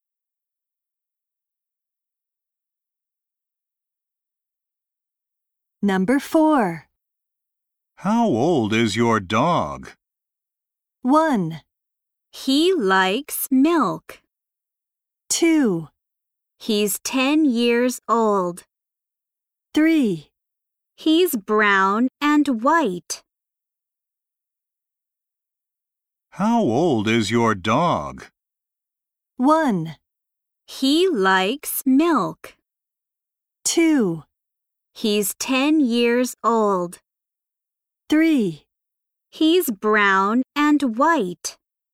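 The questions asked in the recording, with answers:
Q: How old is your dog?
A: 2: He's 10 years old.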